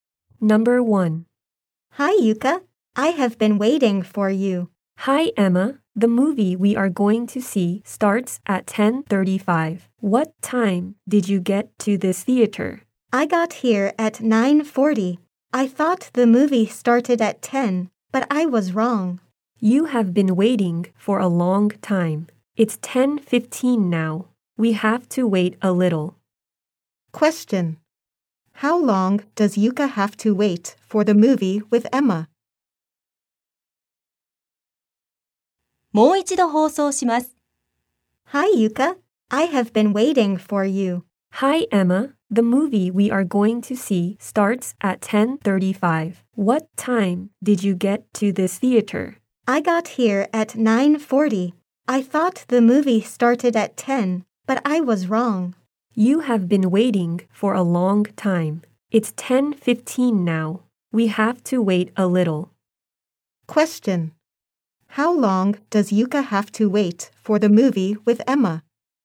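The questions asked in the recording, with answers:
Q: How long does Yuka have to wait for the movie with Emma?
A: 20 minutes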